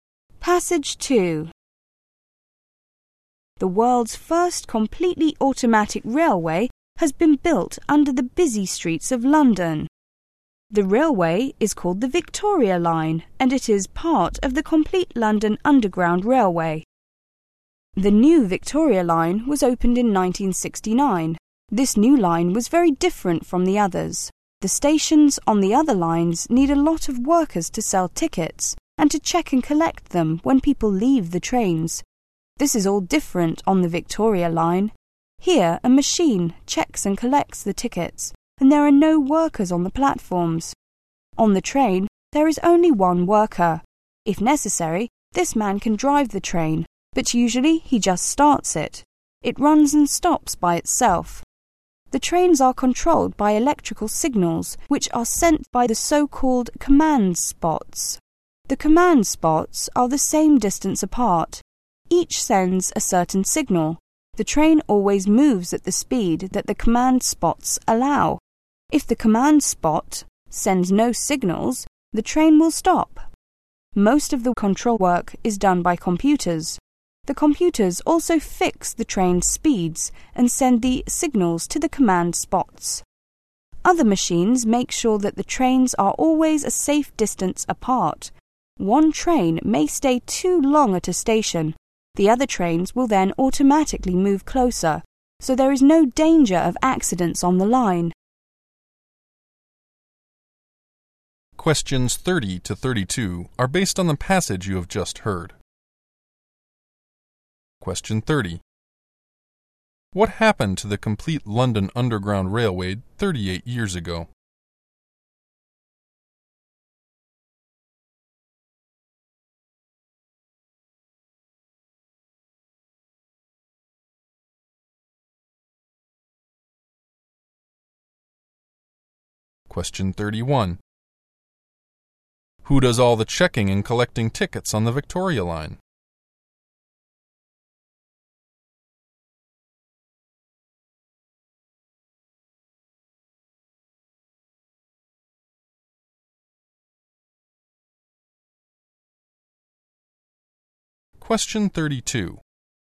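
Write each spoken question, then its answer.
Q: What happened to the complete London Underground Railway 38 years ago?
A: The automatic Victoria Line was opened

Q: Who does all the checking and collecting tickets on the Victoria Line?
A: A machine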